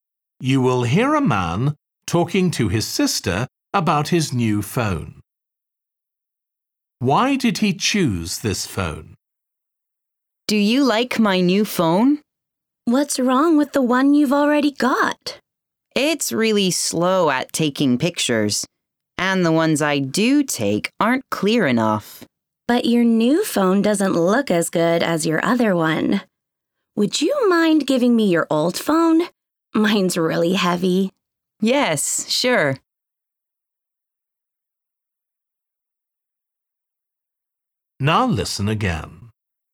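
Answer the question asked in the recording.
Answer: It takes pictures faster and more clearly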